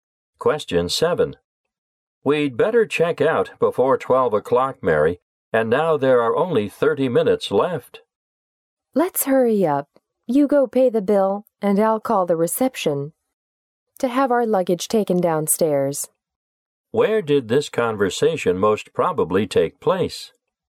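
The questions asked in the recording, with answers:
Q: Where did this conversation most probably take place?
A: In a hotel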